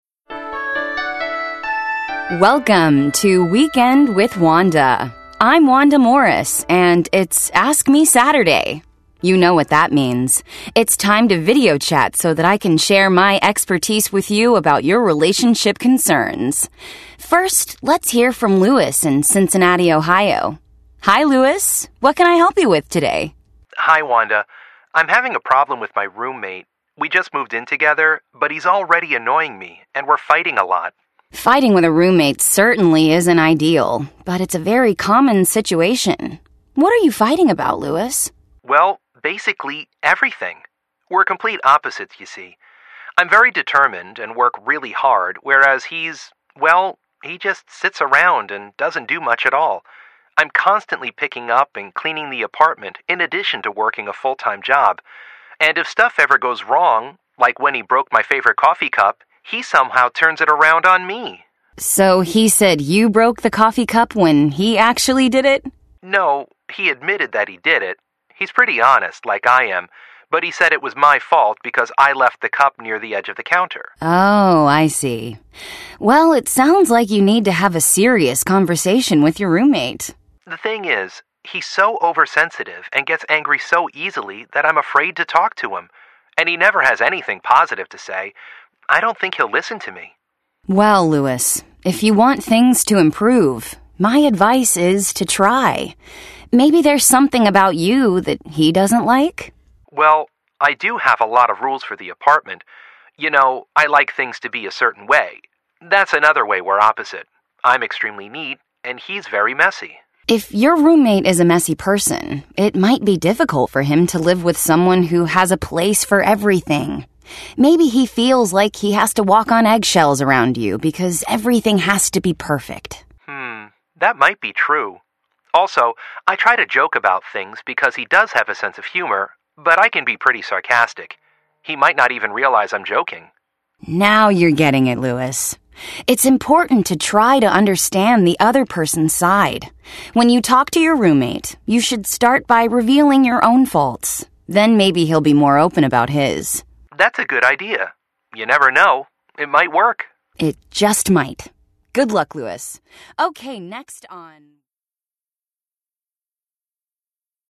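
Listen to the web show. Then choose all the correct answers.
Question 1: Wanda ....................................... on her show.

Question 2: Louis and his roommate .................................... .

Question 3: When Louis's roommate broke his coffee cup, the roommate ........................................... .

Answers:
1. gives advice about relationship concerns
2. are complete opposites and fight a lot
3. admitted it but said it was Louis's fault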